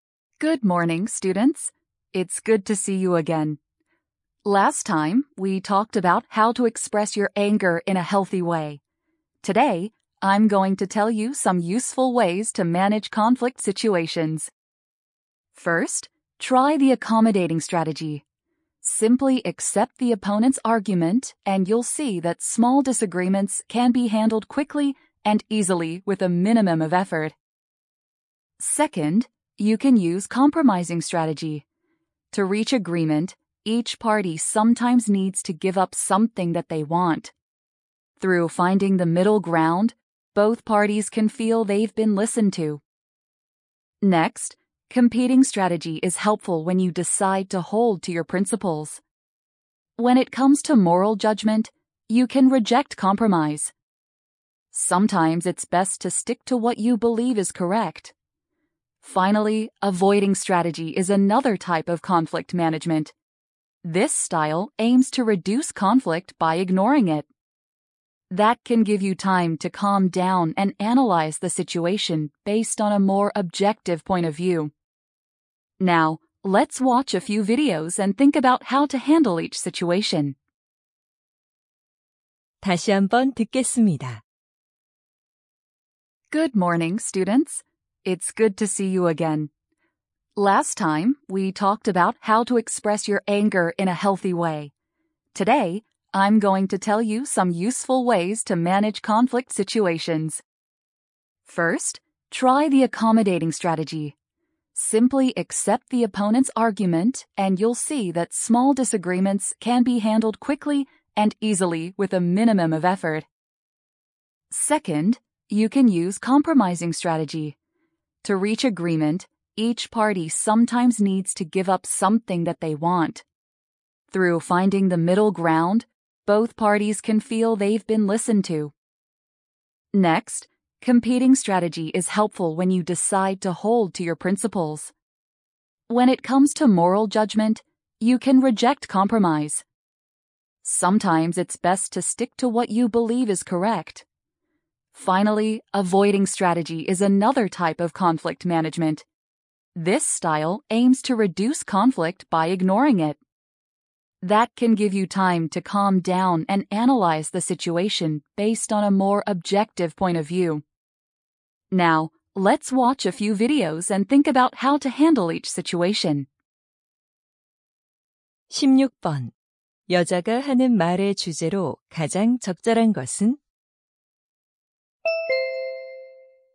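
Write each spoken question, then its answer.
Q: 여자가 하는 말의 주제로 가장 적절한 것은?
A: 갈등 상황을 관리하는 유용한 방법들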